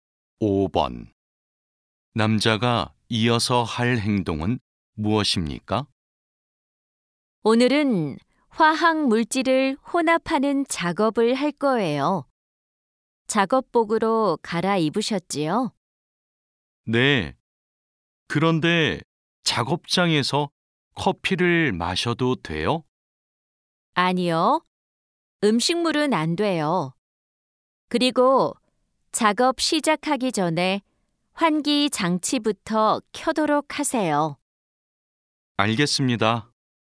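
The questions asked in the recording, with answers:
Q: 남자가 이어서 할 행동은 무엇입니까?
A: 환기 장치를 켠다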